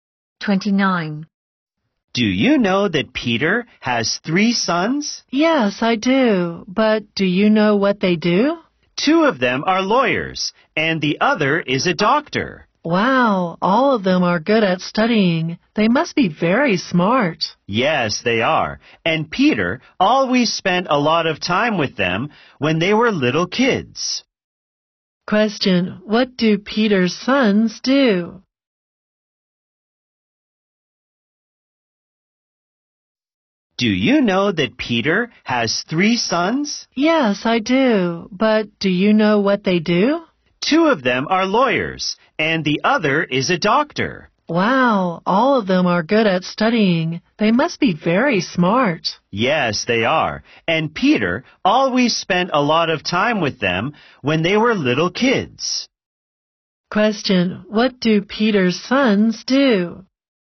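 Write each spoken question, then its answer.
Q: what do Peter's sons do?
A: Two are lawyers and one is a doctor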